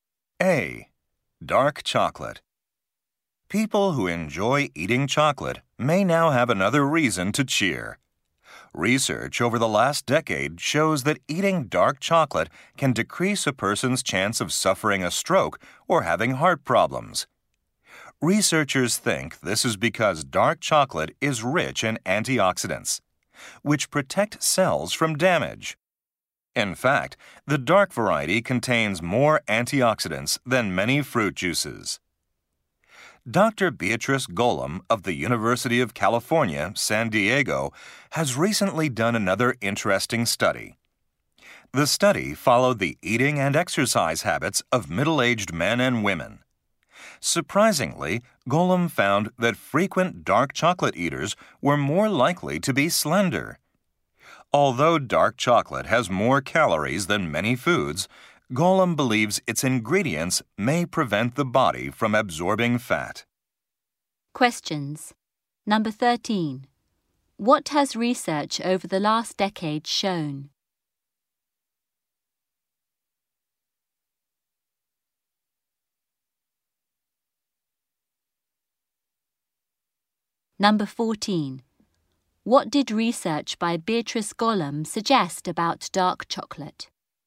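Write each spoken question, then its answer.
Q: What has research over the last decade shown?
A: Dark chocolate can lower the risk of strokes and heart problems.

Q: What did research by Beatrice Gollum suggest about dark chocolate?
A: It may stop the body from absorbing fat, so people who eat it often tend to be slimmer.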